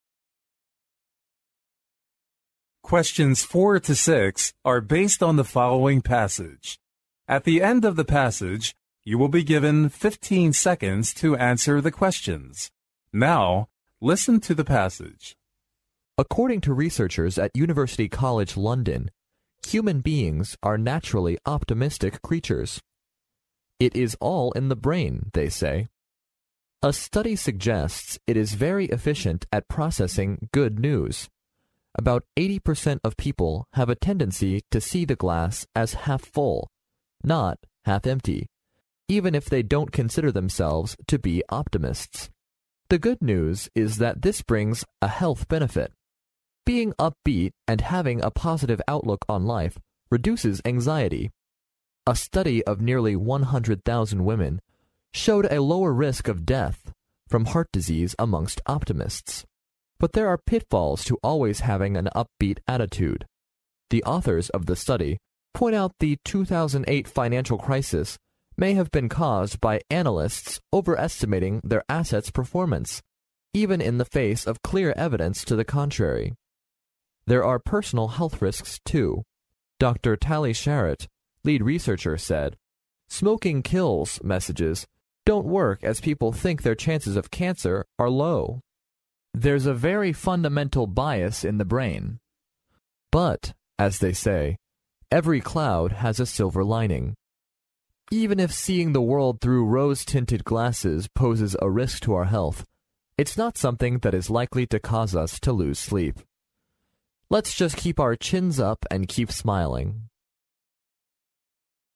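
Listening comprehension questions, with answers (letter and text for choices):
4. According to the research,the brain is very efficient at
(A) pointing out health risks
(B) processing good news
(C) suggesting a tendency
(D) bringing health benefits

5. What is the health benefit of being naturally optimistic?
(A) It helps to reduce anxiety.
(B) It eliminates the fundamental bias.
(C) It lowers the risks of deaths and injuries.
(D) It minimizes the likelihood to lose sleep.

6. According to the passage, which of the following is CORRECT?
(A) About 80% of people consider themselves to be optimists.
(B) Optimists have lower risk of death from heart disease.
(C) An upbeat attitude bears no disadvantages.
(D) There's no fundamental bias in the brain of an optimist.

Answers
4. (B) processing good news
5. (A) It helps to reduce anxiety.
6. (B) Optimists have lower risk of death from heart disease.

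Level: 英语四级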